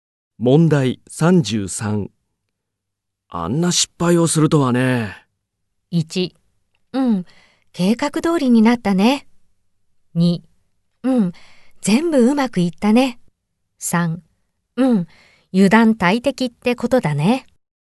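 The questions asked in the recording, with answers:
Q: あんな失敗をするとはね。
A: 3: うん、油断大敵ってことだね。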